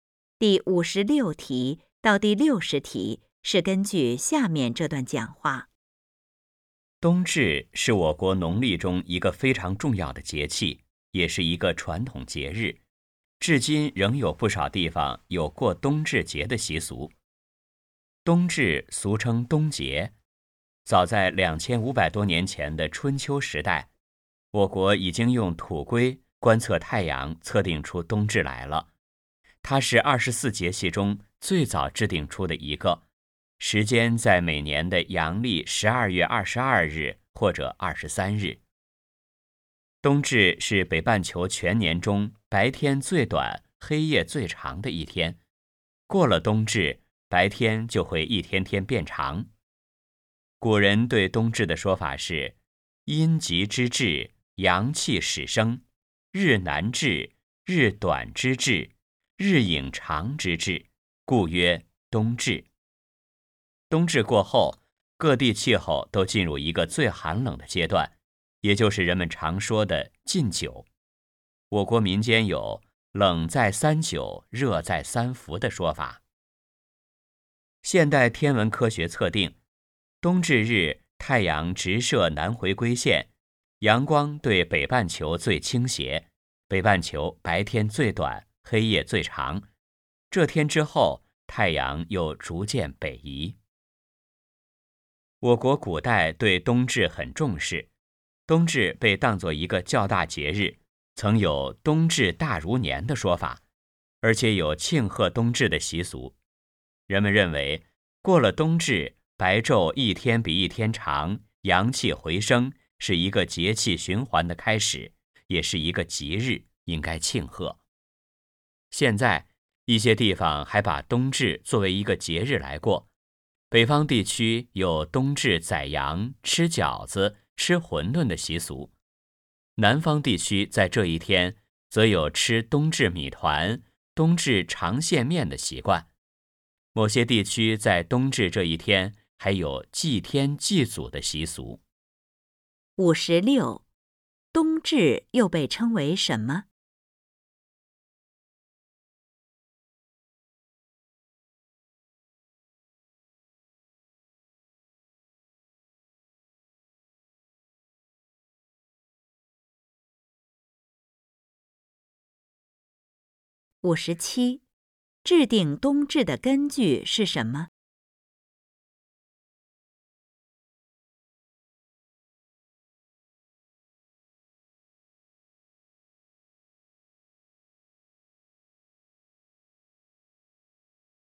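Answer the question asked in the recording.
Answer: 冬节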